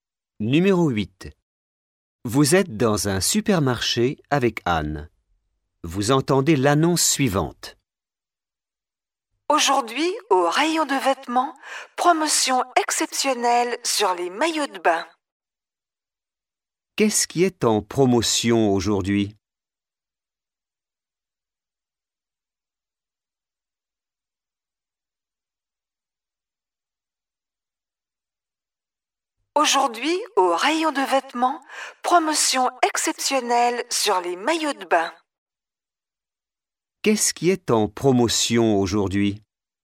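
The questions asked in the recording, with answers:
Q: Qu'est-ce qui est en promotion aujourd'hui ?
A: Les maillots de bain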